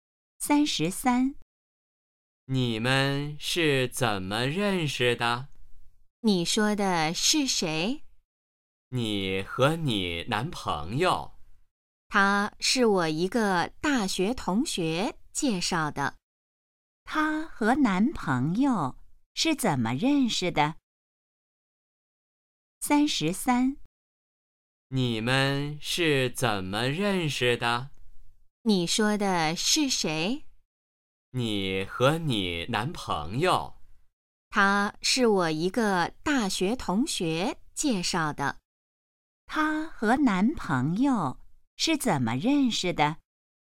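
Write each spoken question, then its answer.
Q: 他和男朋友是怎么认识的?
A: 大学同学介绍的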